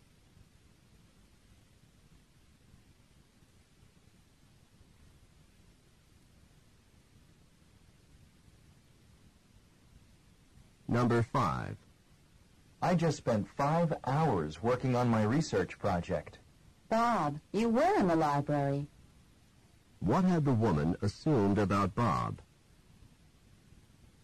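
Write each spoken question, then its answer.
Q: What had the woman assumed about Bob?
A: That he was not in the library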